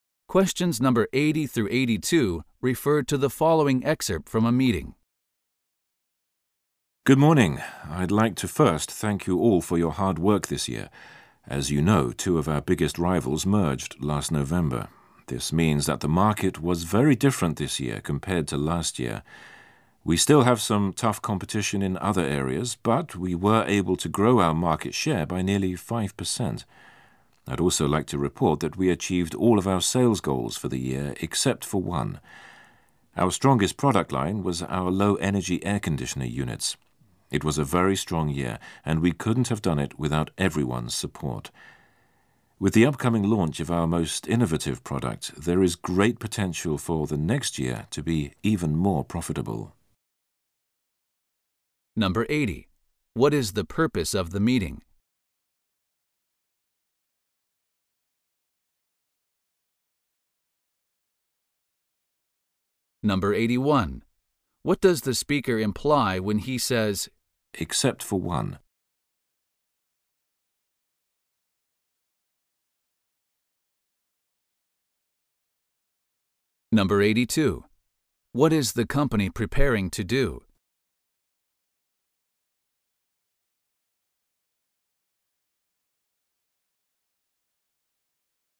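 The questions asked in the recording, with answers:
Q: What is the purpose of the meeting?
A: To review the company's performance over the past year

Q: What does the speaker imply when he says, except for one?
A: One sales goal was not met

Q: What is the company preparing to do?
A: Launch a new, innovative product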